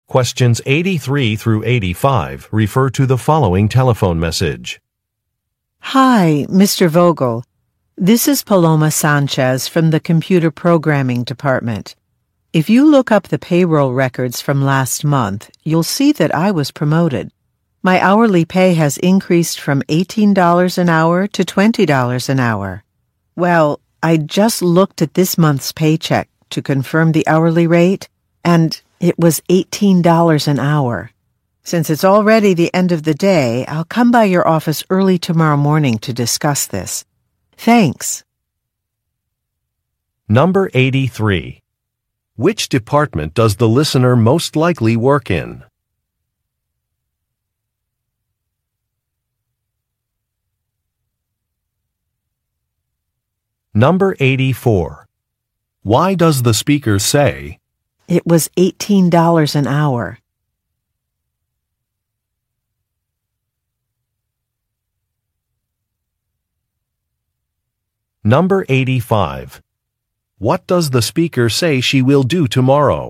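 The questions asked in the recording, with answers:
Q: Why does the speaker say, "It was $18 an hour"?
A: To point out an error in her pay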